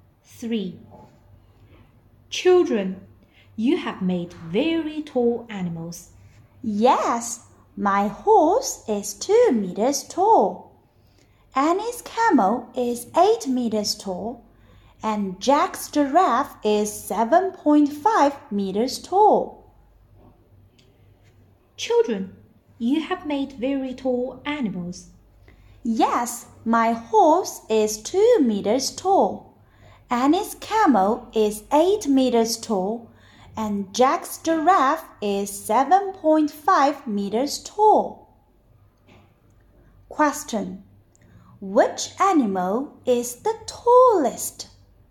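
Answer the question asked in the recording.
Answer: Annie's camel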